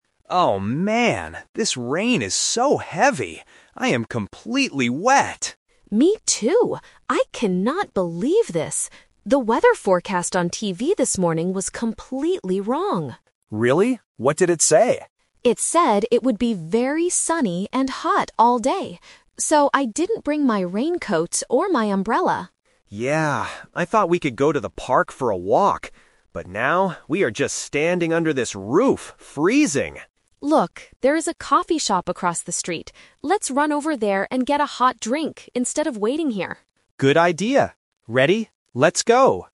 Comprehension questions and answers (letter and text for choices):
Listen to the conversation and choose the best answer (A, B, or C).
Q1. What did the weather forecast say this morning?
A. It would rain heavily.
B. It would be very sunny and hot.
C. It would be cloudy and cold.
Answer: B. It would be very sunny and hot.

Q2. Why is Lisa complaining?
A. Because she lost her raincoat.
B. Because she cannot go to the park.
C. Because she didn't bring an umbrella.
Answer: C. Because she didn't bring an umbrella.

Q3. What will the friends do next?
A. Go to a coffee shop.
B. Go to the park for a walk.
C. Wait under the roof for the rain to stop.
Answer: A. Go to a coffee shop.

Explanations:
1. Lisa says, "It said it would be very sunny and hot all day." Option (A) is the trap because heavy rain is the actual weather happening right now, not what the forecast predicted. Option (C) is never mentioned.
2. Lisa complains about the wrong forecast and says, "So, I didn't bring my raincoat or my umbrella." Option (A) is a trap; she didn't bring it, but she didn't lose it. Option (B) is a trap because going to the park was Tom's idea, not Lisa's main complaint.
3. Lisa changes the plan (The Twist) by suggesting, "Let's run over there and get a hot drink instead of waiting here," and Tom agrees. Option (B) is the trap because it was Tom's initial plan before the rain. Option (C) is a trap because Lisa explicitly says she wants to go "instead of waiting here."

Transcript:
Tom: Oh man, this rain is so heavy! I am completely wet.
Lisa: Me too. I cannot believe this. The weather forecast on TV this morning was completely wrong.
Tom: Really? What did it say?
Lisa: It said it would be very sunny and hot all day. So, I didn't bring my raincoat or my umbrella.
Tom: Yeah. I thought we could go to the park for a walk. But now, we are just standing under this roof, freezing!
Lisa: Look, there is a coffee shop across the street. Let's run over there and get a hot drink instead of waiting here.